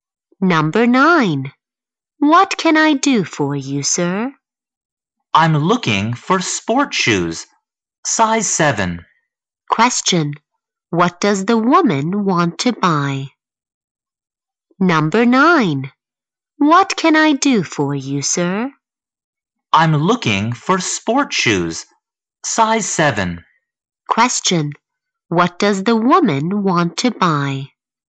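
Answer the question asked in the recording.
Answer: Sport shoes, size 7.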